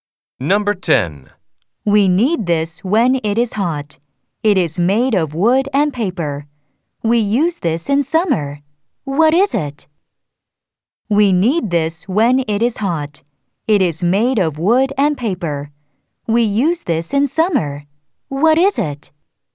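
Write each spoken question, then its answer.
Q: We use this in summer. What is it?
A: a fan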